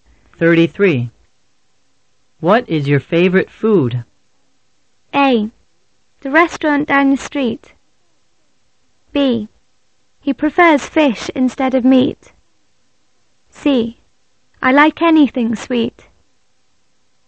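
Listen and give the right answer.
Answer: C: I like anything sweet.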